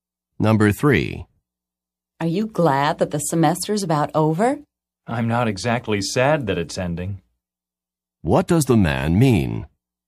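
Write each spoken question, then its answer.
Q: What does the man mean?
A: He is glad the semester is ending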